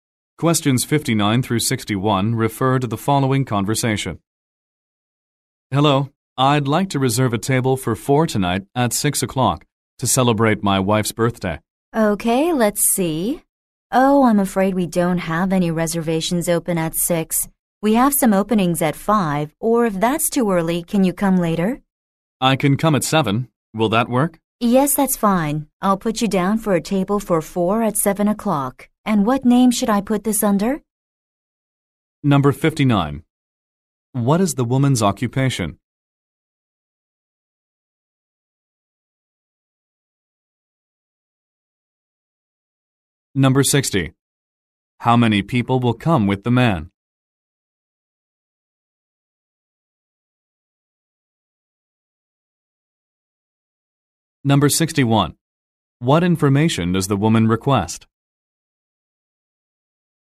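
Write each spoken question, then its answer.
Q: What is the woman's occupation?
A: Restaurant employee taking reservations

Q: What information does the woman request?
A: The name for the reservation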